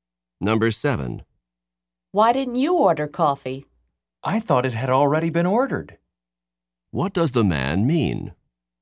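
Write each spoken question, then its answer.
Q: What does the man mean?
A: He thought someone had already ordered coffee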